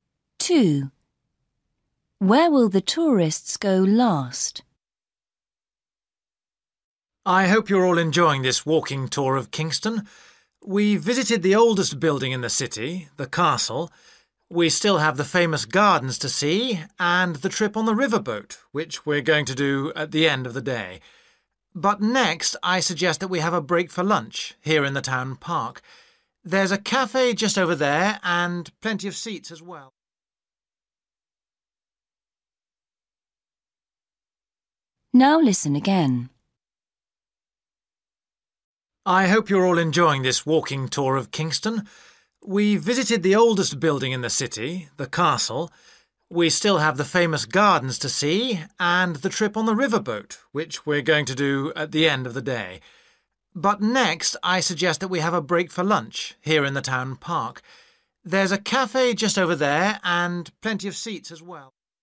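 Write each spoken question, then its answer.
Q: Where will the tourists go last?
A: on the riverboat trip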